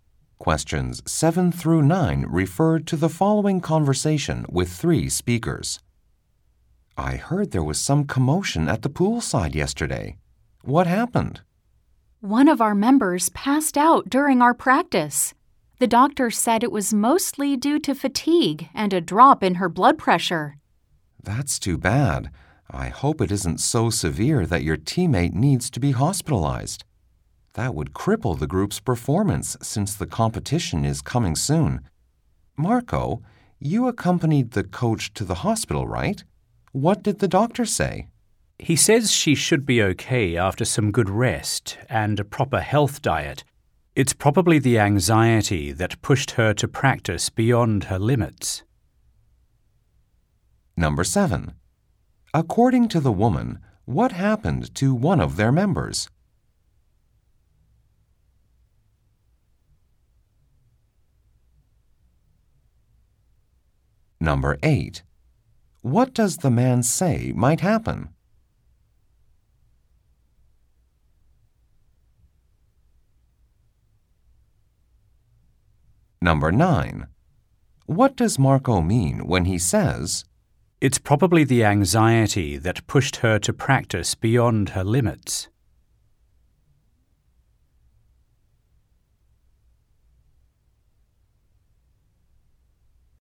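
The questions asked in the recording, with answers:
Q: According to the woman, what happened to one of their members?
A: She passed out during practice.

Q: What does the man say might happen?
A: The group's performance in the upcoming competition could suffer if the teammate is hospitalized.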